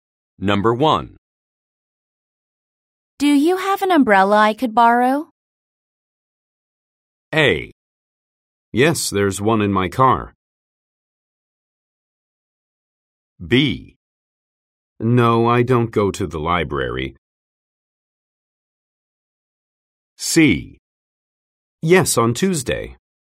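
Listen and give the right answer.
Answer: A: Yes, there's one in my car.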